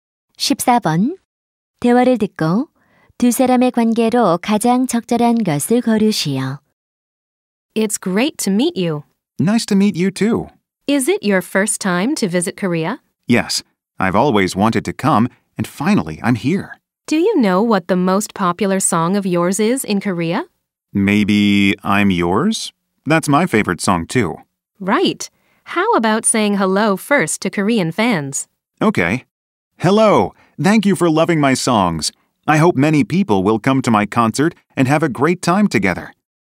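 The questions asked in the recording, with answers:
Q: 대화를 듣고 두 사람의 관계로 가장 적절한 것을 거르시오.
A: 인터뷰 진행자 - 가수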